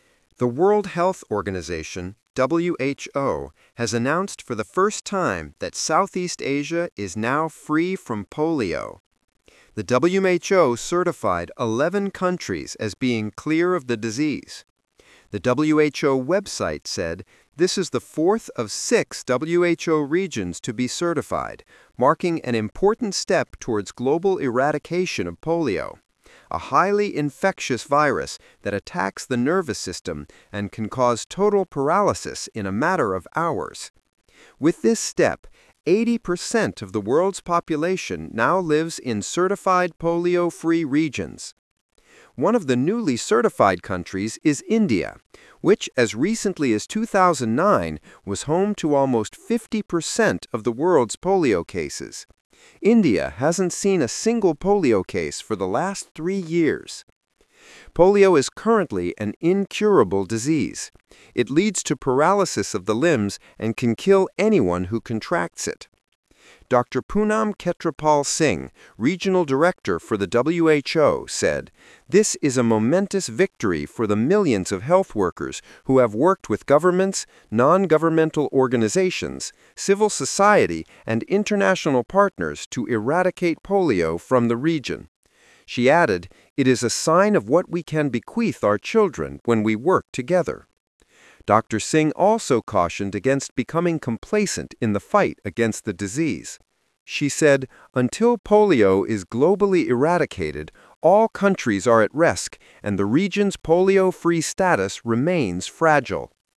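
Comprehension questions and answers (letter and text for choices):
Talk/Lecture 3: Listen to a talk about Asian nations declared polio-free.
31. How many times has Asia been polio-free before?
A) three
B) none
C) one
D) Two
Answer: B) none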